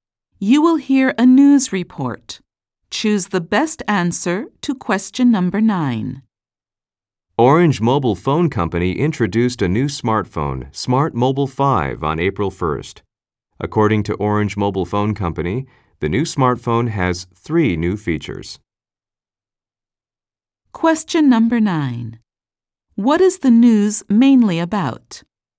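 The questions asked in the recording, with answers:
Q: What is the news mainly about?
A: Orange Mobile Phone Company's new smartphone, Smart Mobile 5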